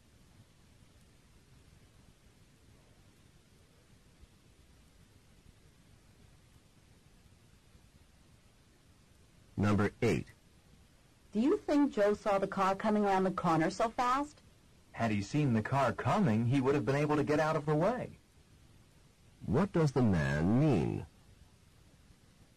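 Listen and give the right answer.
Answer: Joe did not see the car coming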